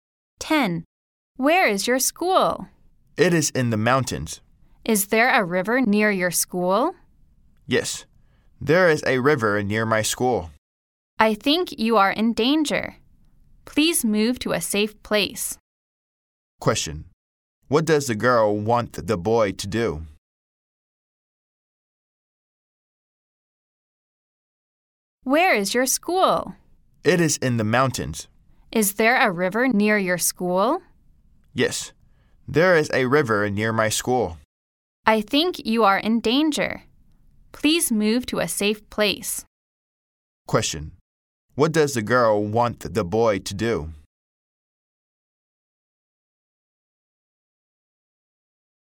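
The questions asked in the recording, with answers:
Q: What does the girl want the boy to do?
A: Move to a safe place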